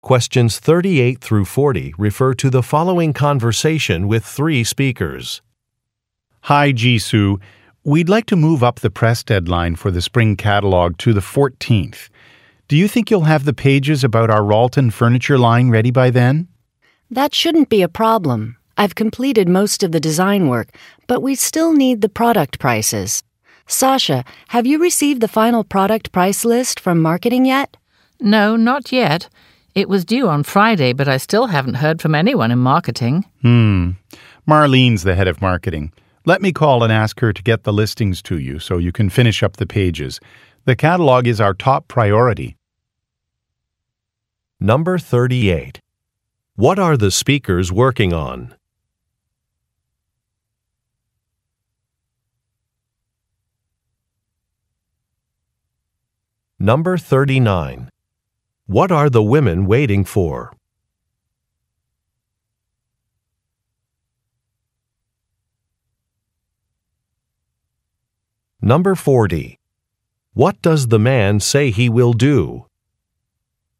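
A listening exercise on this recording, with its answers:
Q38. What are the speakers working on?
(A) Training a colleague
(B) Relocating an office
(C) Planning a budget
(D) Creating a catalog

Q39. What are the women waiting for?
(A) A project proposal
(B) Some price information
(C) An official signature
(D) Some sample products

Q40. What does the man say he will do?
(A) Call a department manager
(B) Hire an assistant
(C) Make an announcement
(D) Update a calendar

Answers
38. (D) Creating a catalog
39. (B) Some price information
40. (A) Call a department manager

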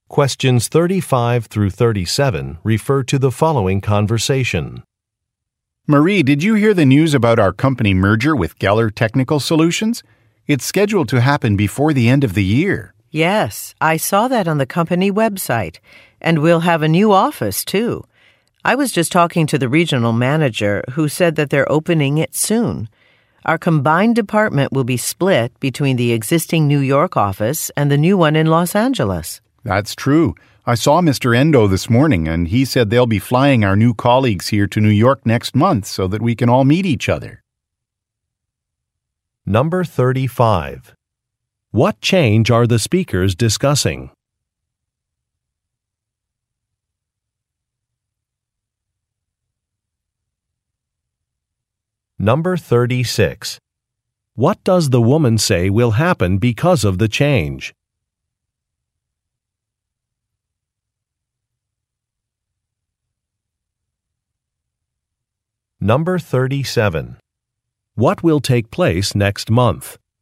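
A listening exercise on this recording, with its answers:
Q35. What change are the speakers discussing?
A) An updated vacation policy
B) A technology upgrade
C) A company merger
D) An office renovation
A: C) A company merger

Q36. What does the woman say will happen because of the change?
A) Managers will have to attend a workshop.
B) Work hours will be more flexible.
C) An employee handbook will be revised.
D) Another branch location will open.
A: D) Another branch location will open.

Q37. What will take place next month?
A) A product launch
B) An annual survey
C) Staff introductions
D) Contract negotiations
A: C) Staff introductions

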